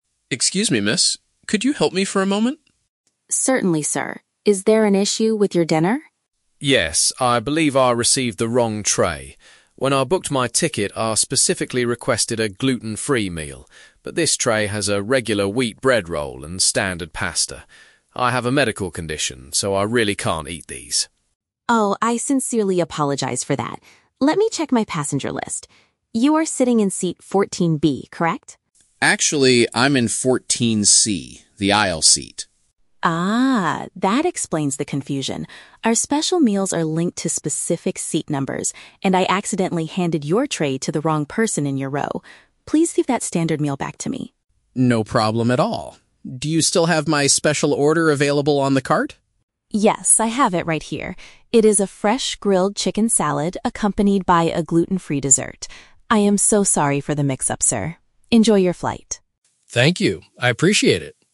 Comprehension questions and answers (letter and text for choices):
Listen to a conversation between a passenger and a flight attendant. For each question, choose the correct answer (A, B, or C).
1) What is the main problem the passenger is reporting?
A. The airline completely forgot to prepare his pre-ordered dinner.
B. He was given a dish containing ingredients he must avoid.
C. The food he received is currently too cold for him to eat.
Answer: B. He was given a dish containing ingredients he must avoid.

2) How did the meal mistake happen?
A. The passenger changed his seat without informing the flight crew.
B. The catering company printed the wrong name on the food box.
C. The flight attendant served the food to the incorrect position in the row.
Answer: C. The flight attendant served the food to the incorrect position in the row.

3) What will the passenger actually eat for his dinner?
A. A hot bowl of standard wheat pasta.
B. A cold dish with meat and a safe sweet treat.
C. A piece of regular bread with a chicken salad.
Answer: B. A cold dish with meat and a safe sweet treat.

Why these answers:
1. Tom says he requested a "gluten-free meal" but received "regular wheat bread... I have a medical condition, so I really can't eat these" (ingredients he must avoid). Option (A) is a trap; the airline didn't forget, the food is actually on the cart. Option (C) is a common flight complaint but is not mentioned here.
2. Elena admits, "I accidentally handed your tray to the wrong person in your row" because she thought he was in 14B instead of 14C (incorrect position). Option (A) is a trap; Tom is in 14C, but there is no mention that he changed seats secretly. Option (B) is not mentioned.
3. Elena hands him his correct meal, which is a "fresh grilled chicken salad" (a cold dish with meat) and a "gluten-free dessert" (a safe sweet treat). Option (A) is a trap; the standard pasta is the wrong meal he returned. Option (C) is a trap; he explicitly cannot eat "regular bread".

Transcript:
Tom: Excuse me, miss? Could you help me for a moment?
Elena: Certainly, sir. Is there an issue with your dinner?
Tom: Yes, I believe I received the wrong tray. When I booked my ticket, I specifically requested a gluten-free meal. But this tray has a regular wheat bread roll and standard pasta. I have a medical condition, so I really can't eat these.
Elena: Oh, I sincerely apologize for that. Let me check my passenger list. You are sitting in seat 14B, correct?
Tom: Actually, I'm in 14C. The aisle seat.
Elena: Ah, that explains the confusion. Our special meals are linked to specific seat numbers, and I accidentally handed your tray to the wrong person in your row. Please give that standard meal back to me.
Tom: No problem at all. Do you still have my special order available on the cart?
Elena: Yes, I have it right here. It is a fresh grilled chicken salad accompanied by a gluten-free dessert. I am so sorry for the mix-up, sir. Enjoy your flight.
Tom: Thank you, I appreciate it.